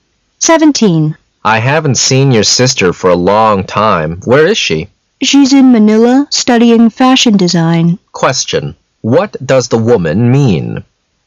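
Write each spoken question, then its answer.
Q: What does the woman mean?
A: Her sister is in Manila studying fashion design.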